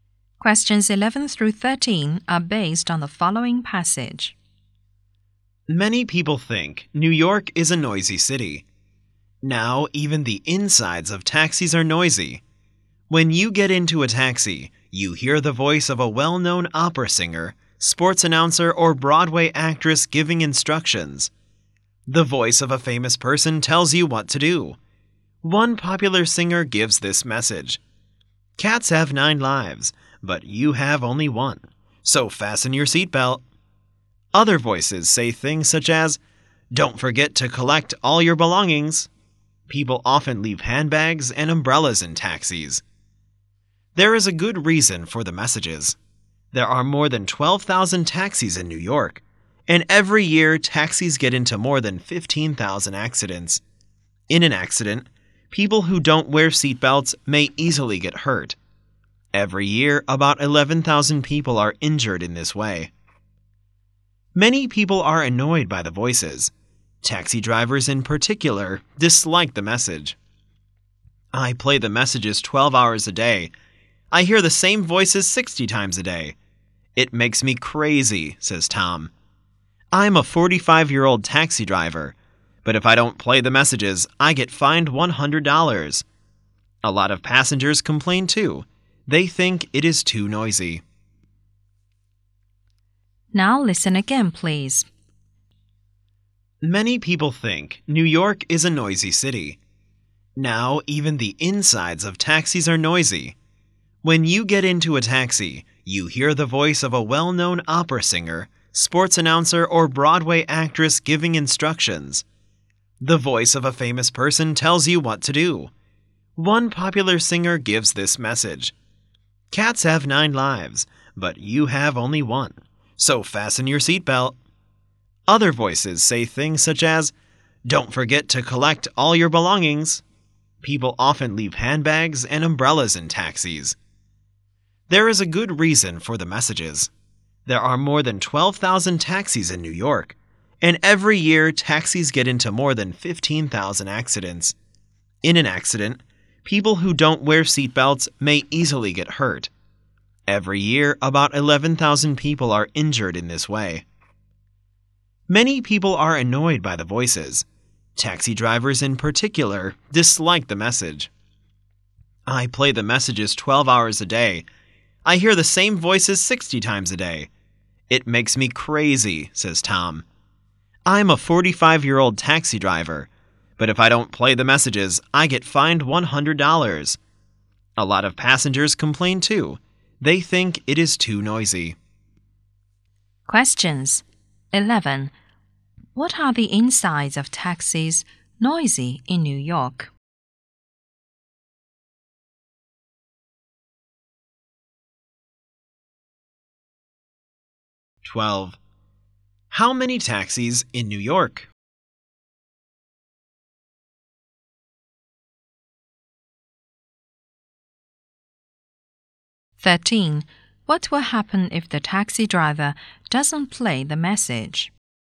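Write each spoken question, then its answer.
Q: What are the insides of taxis noisy in New York?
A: Recorded voices of famous people give instructions to passengers

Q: How many taxis in New York?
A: More than 12,000

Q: What will happen if the taxi driver doesn't play the message?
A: He will be fined $100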